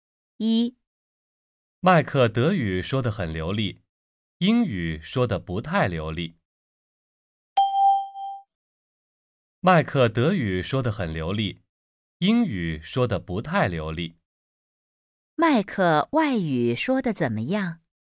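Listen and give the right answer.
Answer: 德语说得很流利,英语说得不太流利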